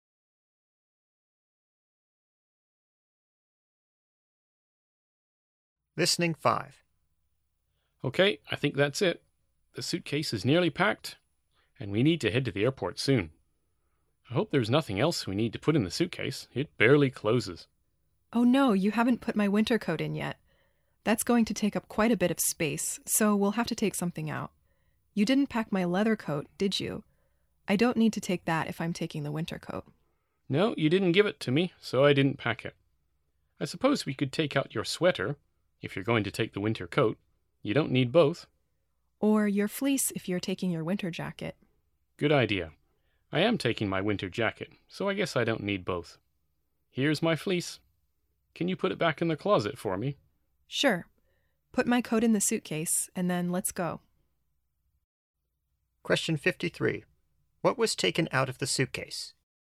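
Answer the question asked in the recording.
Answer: The fleece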